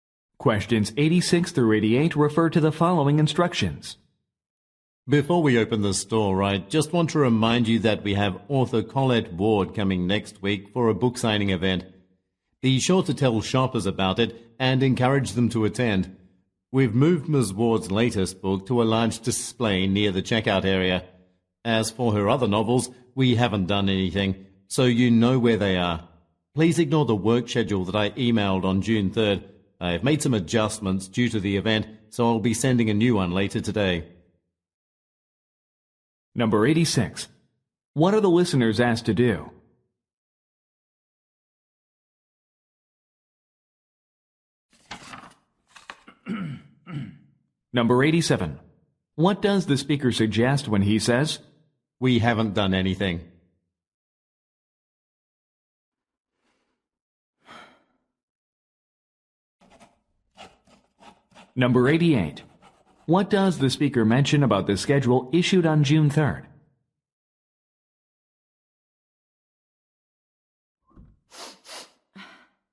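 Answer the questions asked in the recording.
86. Tell shoppers about the book signing and encourage them to attend
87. Ward's other novels are still in their usual places
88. It has been changed and should be ignored; a new one is coming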